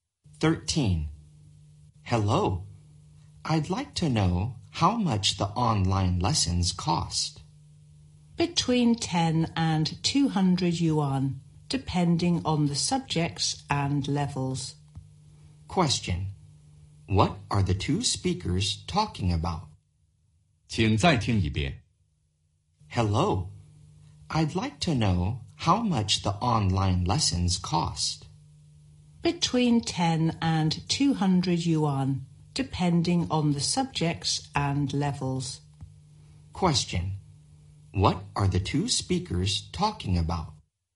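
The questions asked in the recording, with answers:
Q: What are the two speakers talking about?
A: The cost of online lessons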